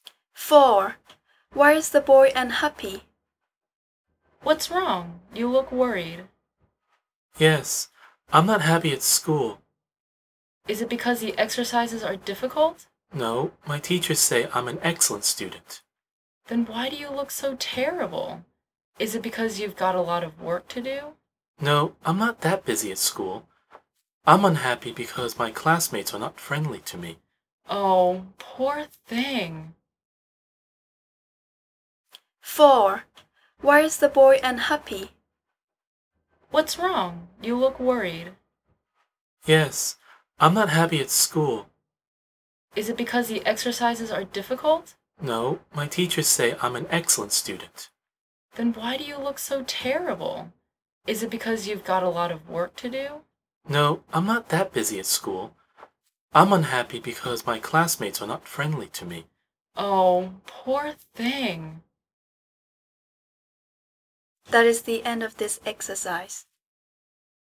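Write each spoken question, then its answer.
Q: Why is the boy unhappy?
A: his classmates are not friendly to him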